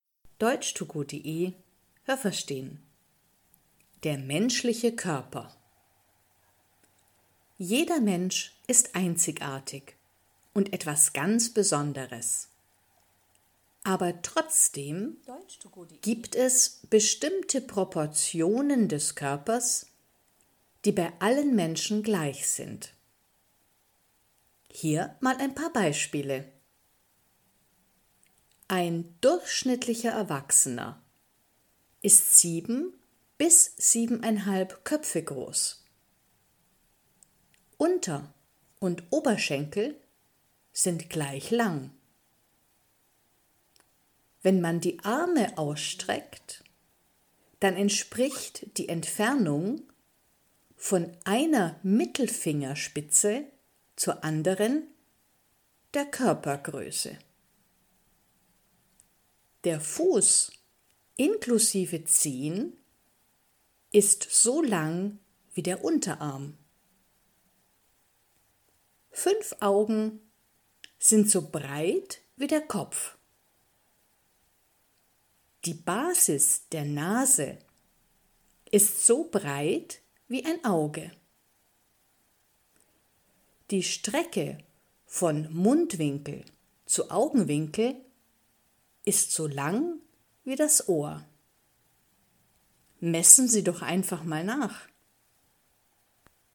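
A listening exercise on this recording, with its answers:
Was haben Sie gehört? Es gibt nur eine korrekte Antwort.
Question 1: Die Proportionen des menschlichen Körpers sind bei allen Menschen _____.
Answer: gleich

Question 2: Ein Erwachsener ...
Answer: ist 7 bis 7,5 Köpfe groß

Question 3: Wenn man die Arme ausstreckt, dann kann man auch abmessen, ...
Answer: wie groß man ist (Körpergröße)

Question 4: Der Unterarm ist so lang wie _____.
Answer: der Fuß inklusive Zehen

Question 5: Fünf Augen sind so _____ wie der Kopf.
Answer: breit

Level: A (einfach)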